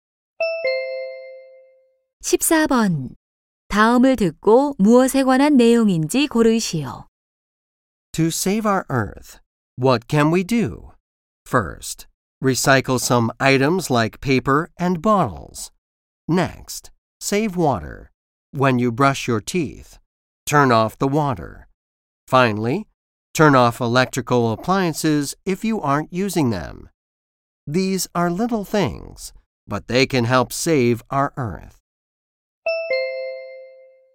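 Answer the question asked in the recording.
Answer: 지구(환경)를 지키는 방법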